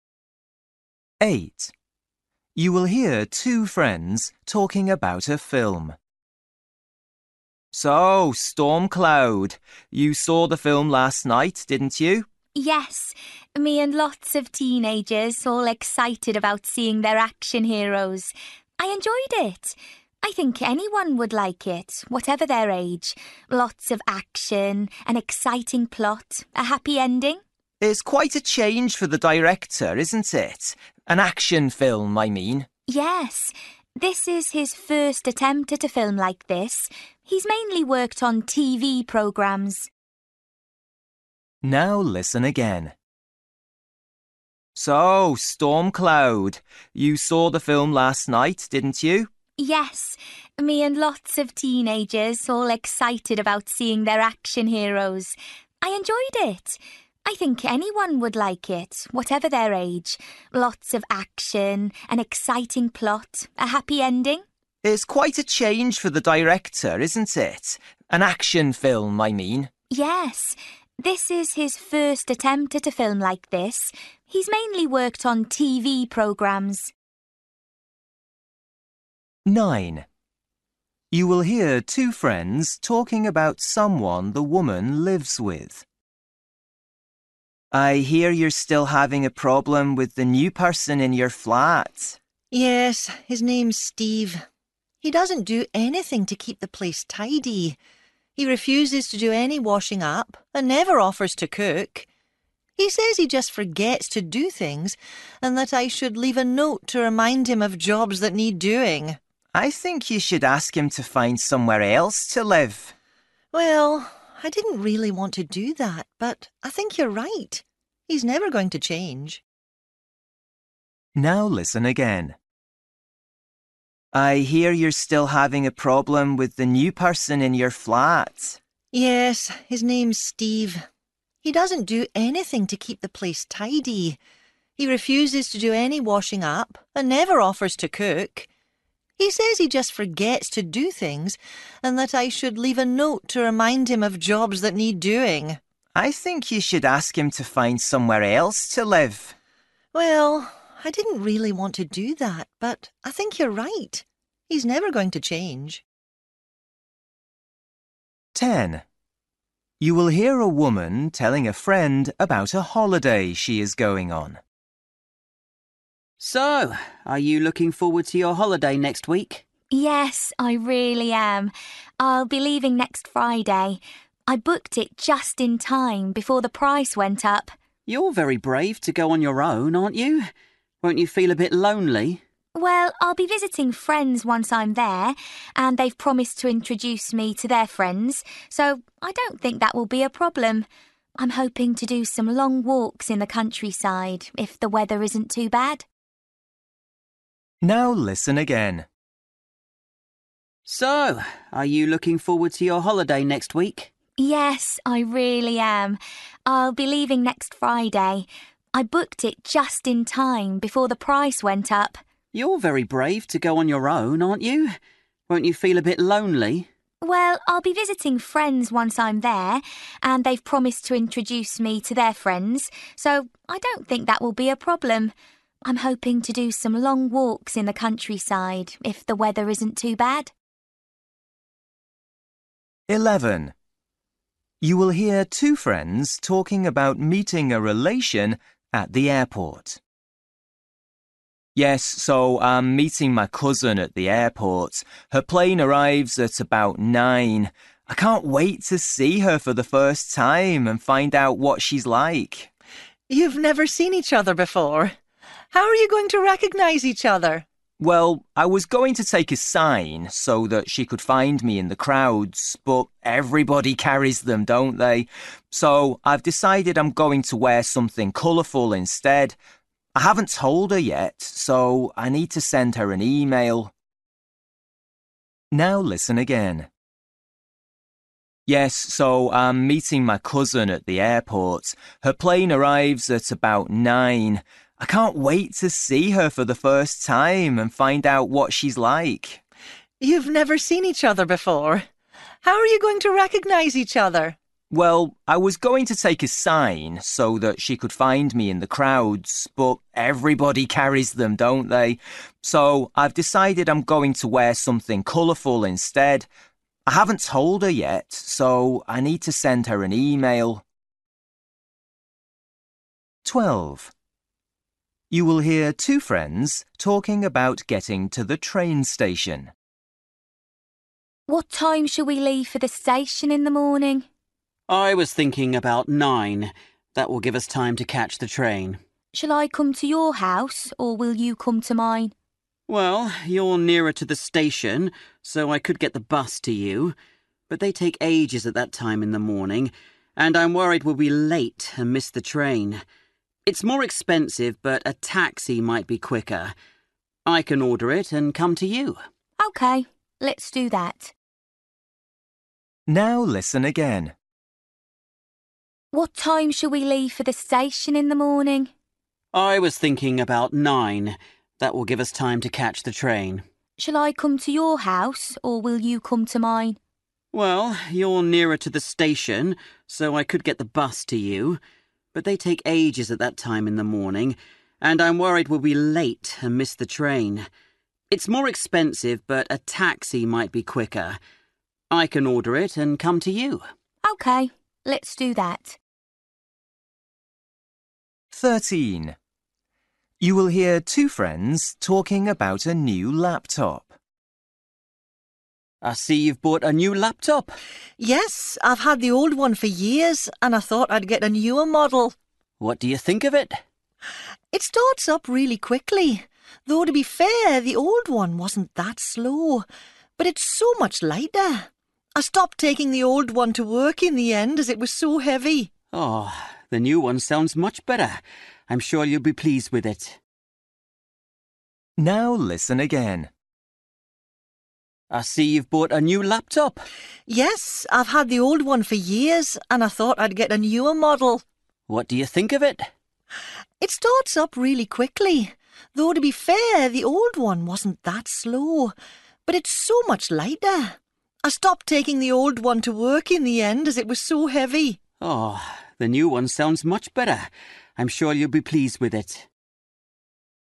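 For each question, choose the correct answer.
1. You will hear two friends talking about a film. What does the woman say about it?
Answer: People of any age would enjoy it.

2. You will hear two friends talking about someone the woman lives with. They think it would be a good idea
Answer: to ask him to find somewhere else to live

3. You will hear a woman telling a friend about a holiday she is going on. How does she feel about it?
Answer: She is looking forward to it and doesn't expect to be lonely.

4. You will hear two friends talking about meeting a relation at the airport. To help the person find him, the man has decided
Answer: to wear something colourful

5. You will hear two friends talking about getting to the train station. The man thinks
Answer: a taxi might be quicker than the bus

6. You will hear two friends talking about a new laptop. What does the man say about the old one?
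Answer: It was too heavy to take to work.

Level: Luyện nghe trình độ B1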